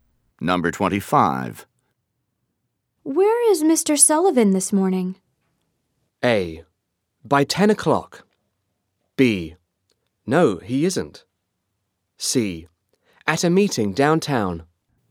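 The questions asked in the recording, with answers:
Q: Where is Mr. Sullivan this morning?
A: C: At a meeting downtown.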